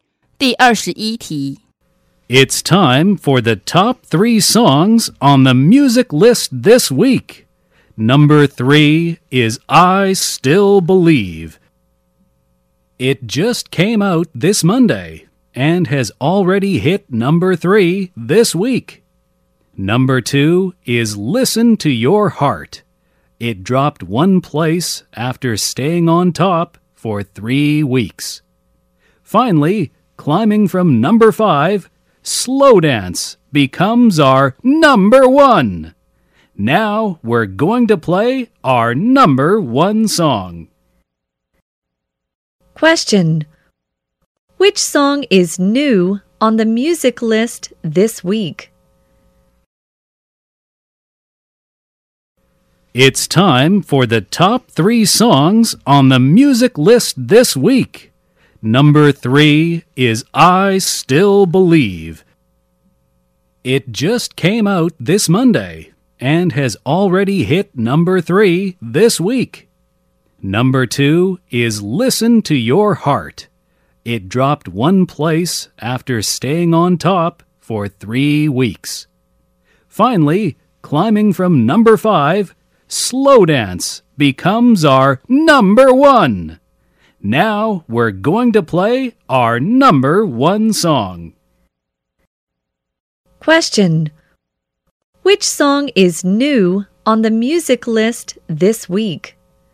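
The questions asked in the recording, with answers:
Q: Which song is new on the music list this week?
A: I Still Believe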